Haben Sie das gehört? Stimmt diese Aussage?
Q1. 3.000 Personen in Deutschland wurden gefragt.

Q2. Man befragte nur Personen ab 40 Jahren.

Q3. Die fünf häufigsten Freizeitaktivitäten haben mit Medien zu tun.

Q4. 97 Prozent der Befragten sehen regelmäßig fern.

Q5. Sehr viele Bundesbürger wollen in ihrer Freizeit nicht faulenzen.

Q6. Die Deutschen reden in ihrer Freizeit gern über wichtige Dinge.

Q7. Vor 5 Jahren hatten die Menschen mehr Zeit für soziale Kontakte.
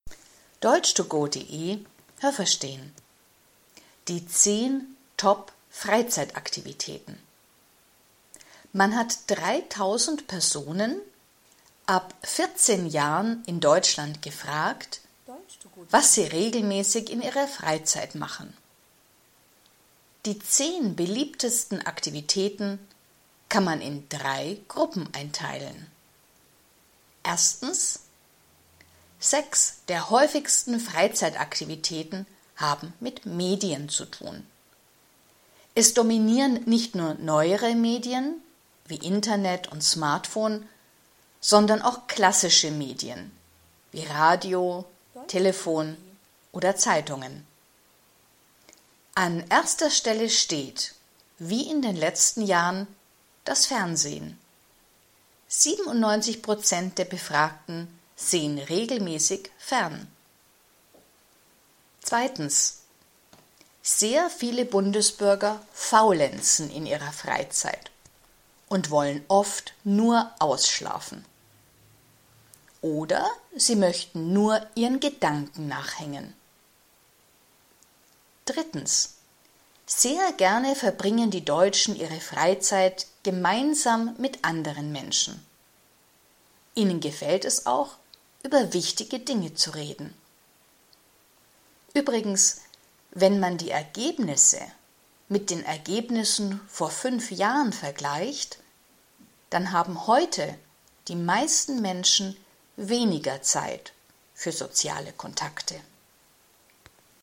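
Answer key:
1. richtig
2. falsch
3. falsch
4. richtig
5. falsch
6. richtig
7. richtig

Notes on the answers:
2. Man befragte Personen ab 14 Jahren.
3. Bei den sechs häufigsten Freizeitaktivitäten sind Medien wichtig.
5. Sie wollen faulenzen, also nichts tun.

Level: A (einfach)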